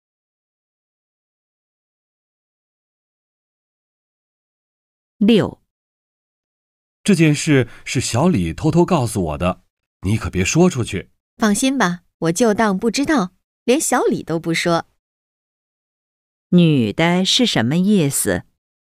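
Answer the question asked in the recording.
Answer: 会保密,谁都不说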